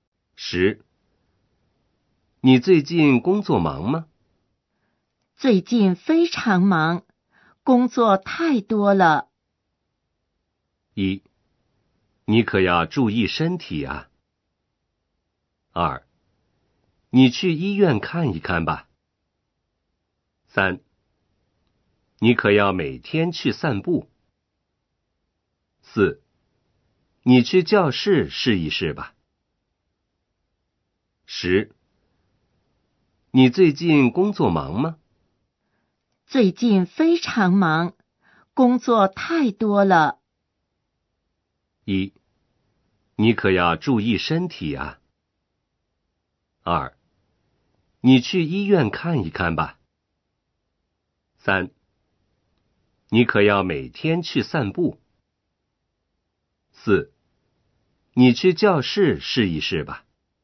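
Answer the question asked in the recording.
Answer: 1: 你可要注意身体啊。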